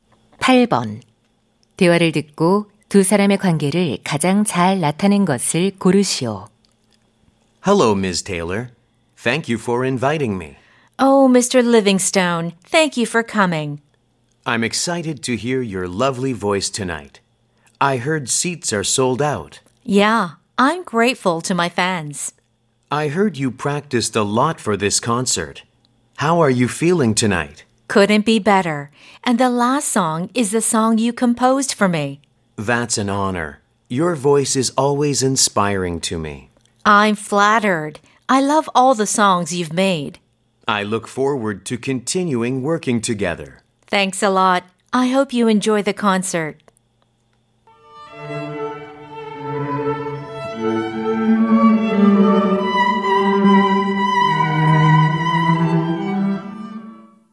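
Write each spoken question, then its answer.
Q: 대화를 듣고 두 사람의 관계를 가장 잘 나타낸 것을 고르시오.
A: 가수와 작곡가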